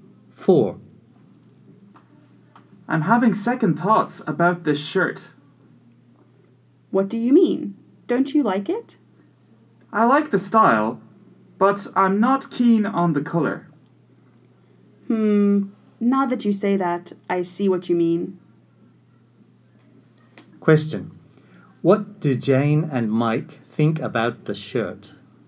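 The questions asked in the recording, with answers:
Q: What do Jane and Mike think about the shirt?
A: They like the style but not the color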